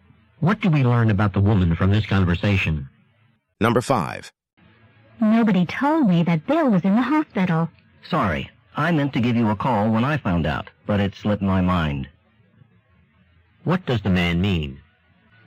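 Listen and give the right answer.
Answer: He forgot to call and tell the woman that Bill was in the hospital.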